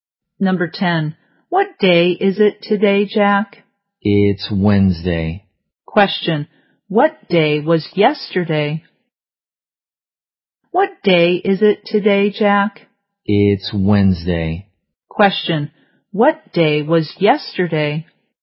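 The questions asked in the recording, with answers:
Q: Question. What day was yesterday?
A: Tuesday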